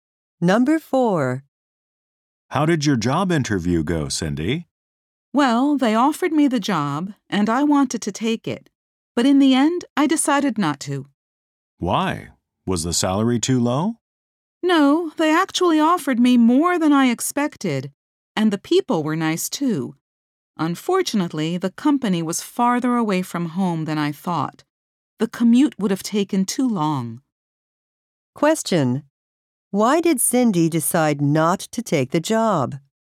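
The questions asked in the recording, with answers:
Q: Why did Cindy decide not to take the job?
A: The commute would have taken too long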